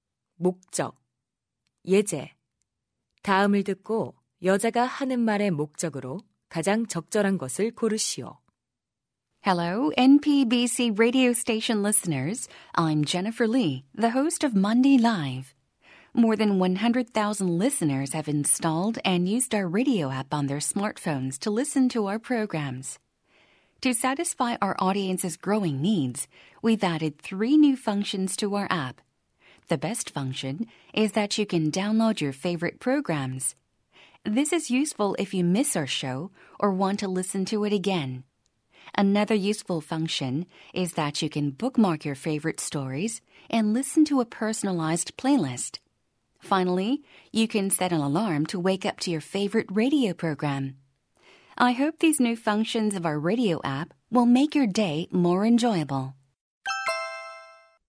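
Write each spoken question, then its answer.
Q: 다음을 듣고 여자가 하는 말의 목적으로 가장 적절한 것을 고르시오.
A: 라디오 앱의 새 기능을 소개하려고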